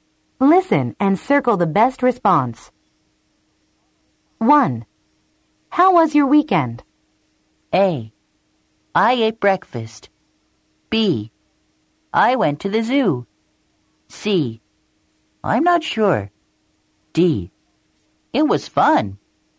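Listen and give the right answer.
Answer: D: It was fun.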